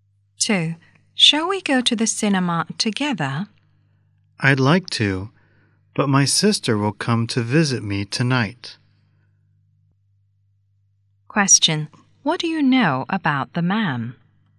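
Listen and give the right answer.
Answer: His sister will visit him tonight, so he can't go to the cinema.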